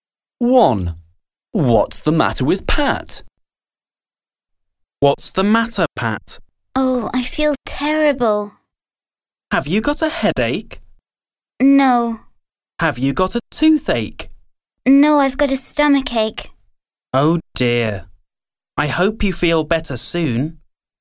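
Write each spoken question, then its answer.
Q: What's the matter with Pat?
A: She has a stomachache.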